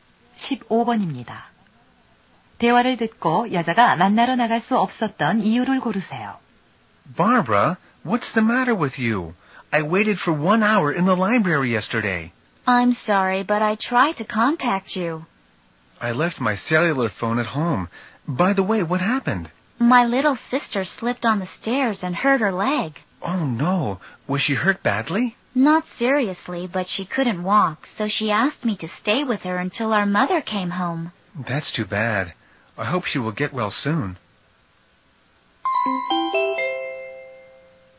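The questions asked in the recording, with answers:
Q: 대화를 듣고 여자가 만나러 나갈 수 없었던 이유를 고르세요.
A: 여동생이 계단에서 미끄러져 다리를 다쳐서 곁에 있어야 했다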